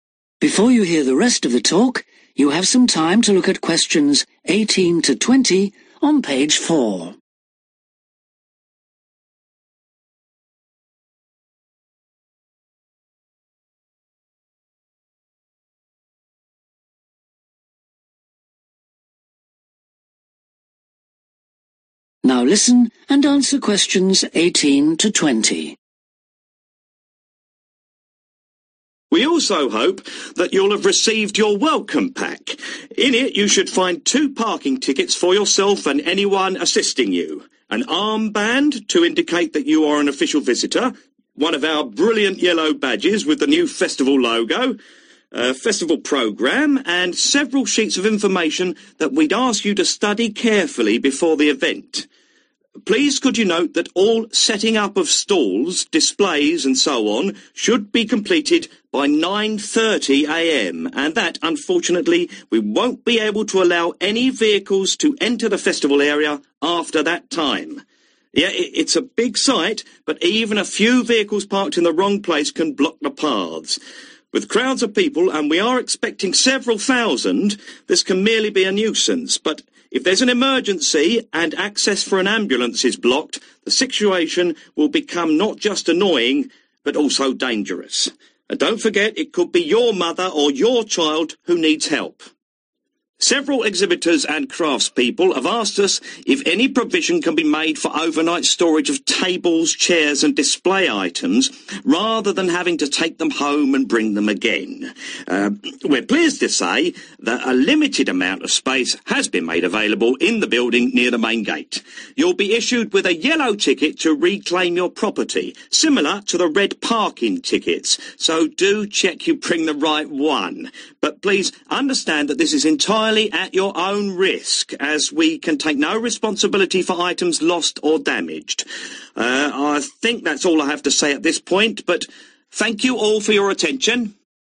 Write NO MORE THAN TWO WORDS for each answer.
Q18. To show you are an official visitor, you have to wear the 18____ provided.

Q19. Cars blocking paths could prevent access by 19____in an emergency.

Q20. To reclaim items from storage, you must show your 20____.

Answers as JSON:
{"18": "armband", "19": "ambulance", "20": "yellow ticket"}